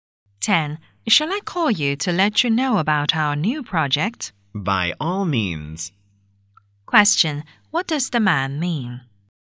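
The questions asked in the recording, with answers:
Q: What does the man mean?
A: The woman is welcome to call him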